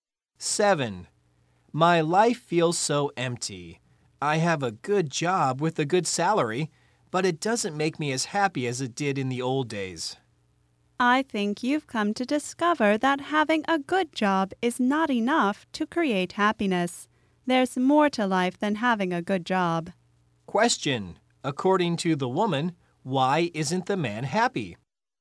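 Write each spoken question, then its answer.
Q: according to the woman, why isn't the man happy?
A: Having a good job is not enough to create happiness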